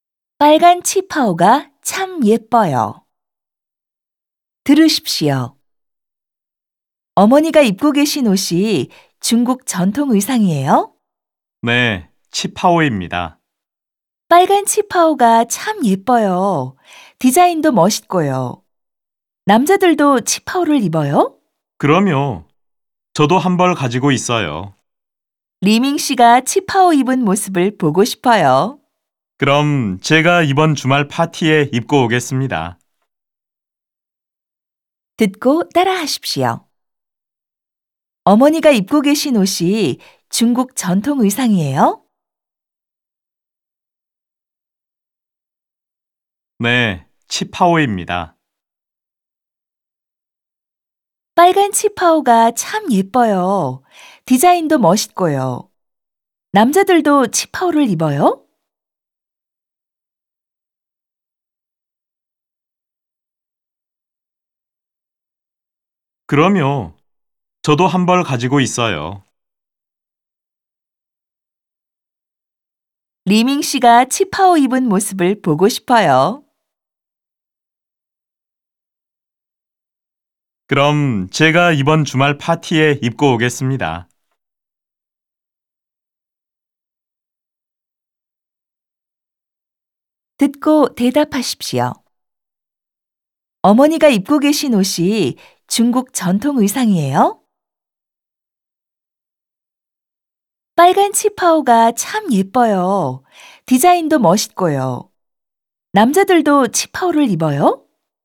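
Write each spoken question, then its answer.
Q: 어머니가 입고 계신 옷이 중국 전통 의상이에요?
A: 네, 치파오입니다.

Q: 남자들도 치파오를 입어요?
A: 그럼요. 저도 한 벌 가지고 있어요.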